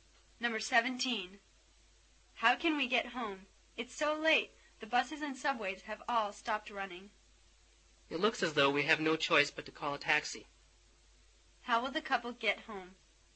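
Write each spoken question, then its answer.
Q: How will the couple get home?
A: By taxi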